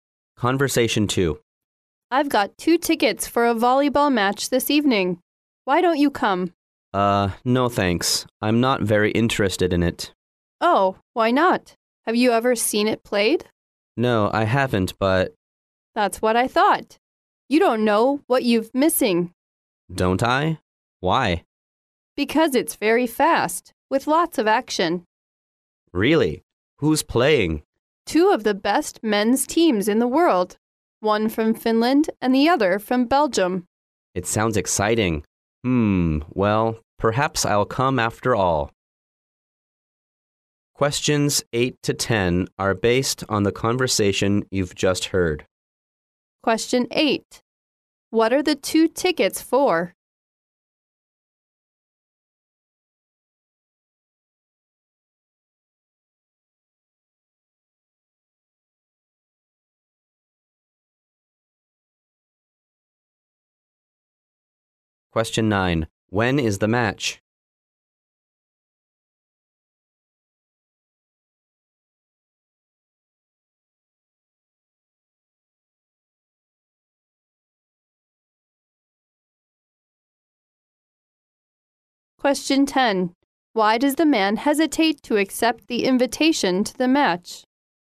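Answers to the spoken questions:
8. A volleyball match
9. This evening
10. He isn't very interested in volleyball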